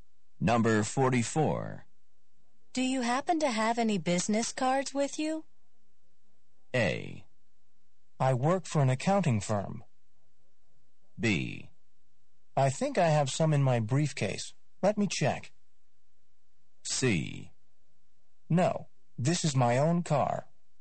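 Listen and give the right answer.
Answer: B: I think I have some in my briefcase. Let me check.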